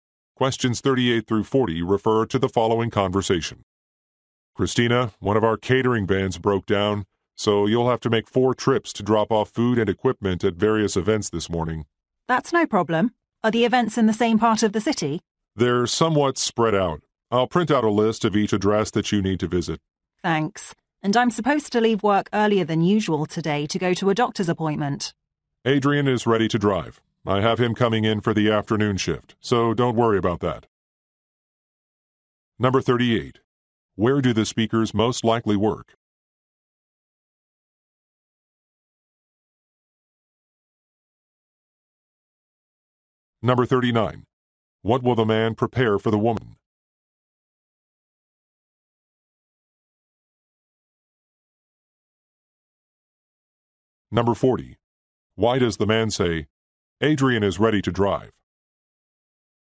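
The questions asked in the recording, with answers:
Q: Where do the speakers most likely work?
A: At a catering company

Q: What will the man prepare for the woman?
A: A list of addresses

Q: Why does the man say, "Adrian is ready to drive"?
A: To reassure her that Adrian will cover the afternoon so she can leave early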